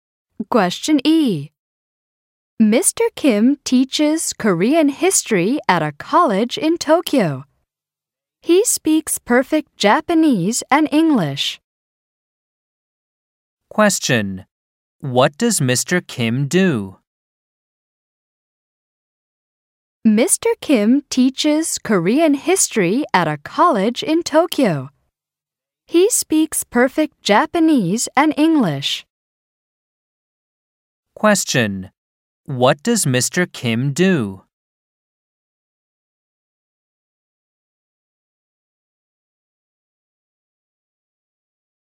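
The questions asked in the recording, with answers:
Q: What does Mr. Kim do?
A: He teaches Korean history at a college in Tokyo.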